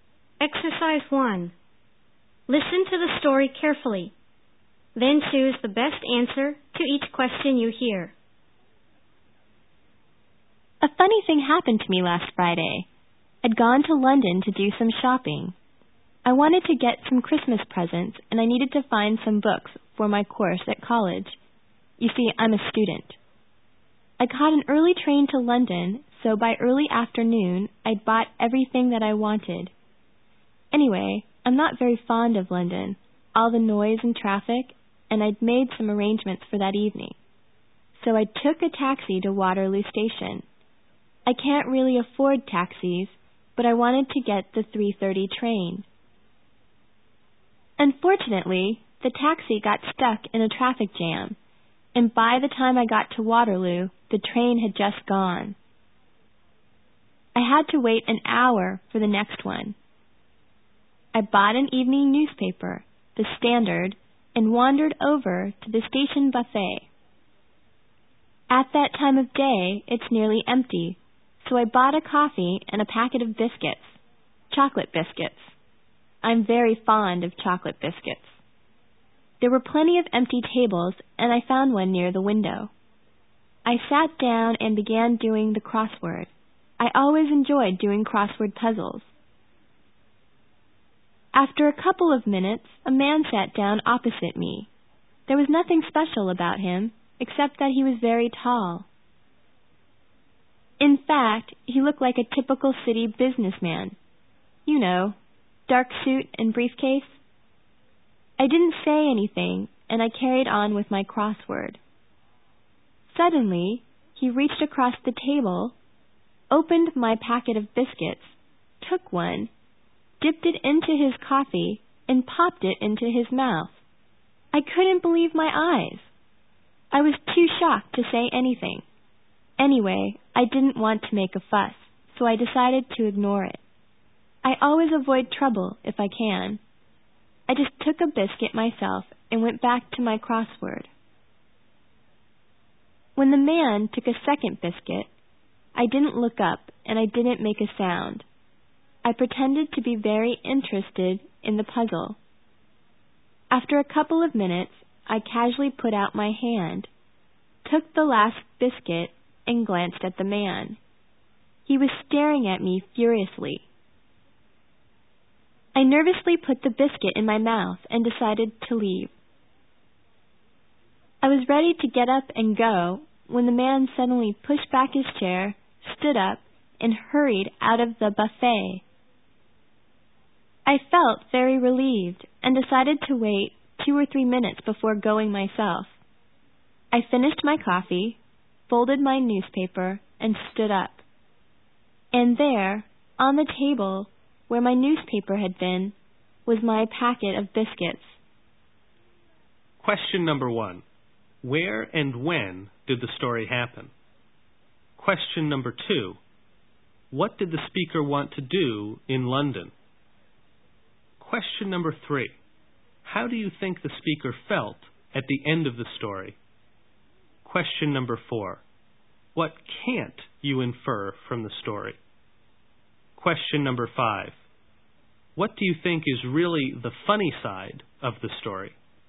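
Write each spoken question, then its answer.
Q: Where and when did the story happen?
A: At the buffet at Waterloo Station in London, last Friday

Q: What did the speaker want to do in London?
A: Buy Christmas presents and books for college

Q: What do you think is really the funny side of the story?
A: The biscuits were really the man's; the speaker had been eating his biscuits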